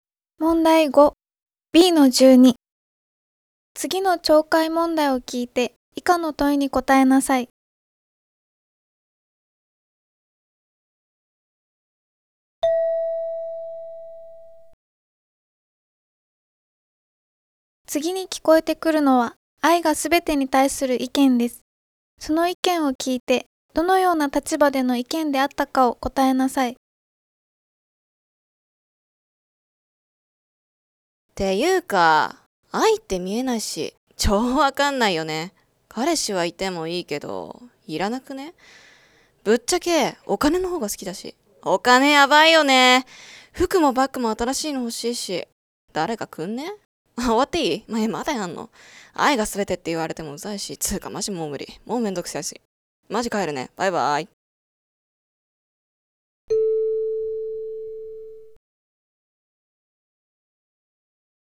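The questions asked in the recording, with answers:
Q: その意見を聞いてどのような立場での意見であったかを答えなさい。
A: 「愛がすべて」に反対する立場(愛よりお金が大事)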